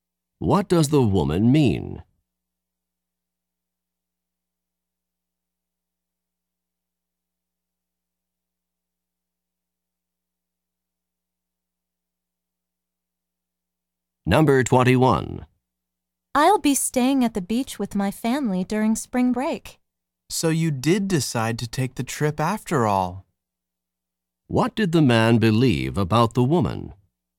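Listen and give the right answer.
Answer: That she would not take the trip.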